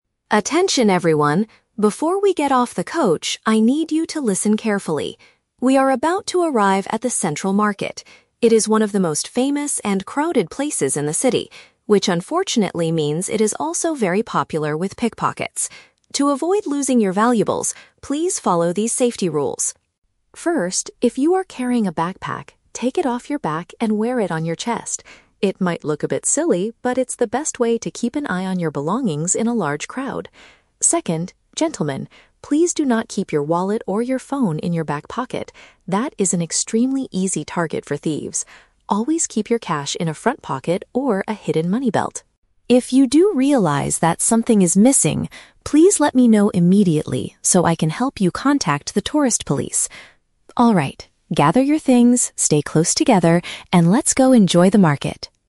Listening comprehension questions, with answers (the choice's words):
Listen to the tour guide speaking to a group of tourists. Choose the correct answer (A, B, or C) for each question.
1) What is the main purpose of the tour guide's announcement?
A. To recommend the best street food in the market.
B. To warn the group about people who steal things.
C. To explain how to contact the local tourist police.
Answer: To warn the group about people who steal things.

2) What does the guide suggest doing with backpacks?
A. Leave them safely inside the tour bus.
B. Hold them tightly in your hands.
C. Carry them on the front of your body.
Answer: Carry them on the front of your body.

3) Where should the tourists keep their money?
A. In a front pocket or a special belt.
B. In their back pants pocket.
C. Inside their backpacks.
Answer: In a front pocket or a special belt.

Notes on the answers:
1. The guide warns the tourists about "pickpockets" and "thieves." Option (B) uses the phrase "people who steal things" to paraphrase these words.
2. The guide tells the tourists to "wear it on your chest." The chest is the front of your body, which matches option (C).
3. The guide explicitly says, "Always keep your cash in a front pocket or a hidden money belt." "Special belt" is a synonym for "money belt."

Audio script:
Tour Guide: Attention everyone, before we get off the coach, I need you to listen carefully. We are about to arrive at the Central Market. It is one of the most famous and crowded places in the city, which unfortunately means it is also very popular with pickpockets. To avoid losing your valuables, please follow these safety rules.
First, if you are carrying a backpack, take it off your back and wear it on your chest. It might look a bit silly, but it's the best way to keep an eye on your belongings in a large crowd. Second, gentlemen, please do not keep your wallet or your phone in your back pocket. That is an extremely easy target for thieves. Always keep your cash in a front pocket or a hidden money belt.
If you do realize that something is missing, please let me know immediately so I can help you contact the tourist police. Alright, gather your things, stay close together, and let's go enjoy the market!